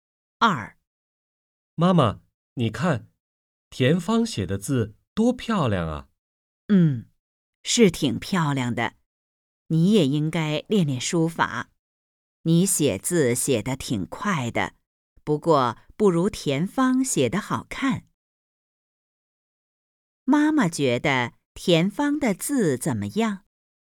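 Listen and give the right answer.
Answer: 很漂亮,比他写得好看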